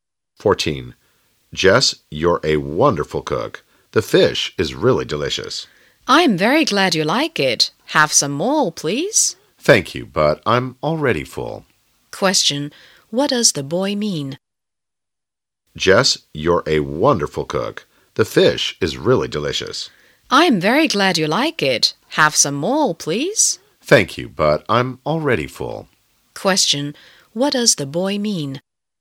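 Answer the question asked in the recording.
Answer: He is full and doesn't want any more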